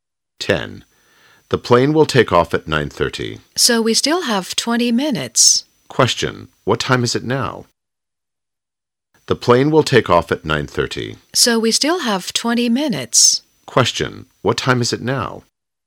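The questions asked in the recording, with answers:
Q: Question. What time is it now?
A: 9:10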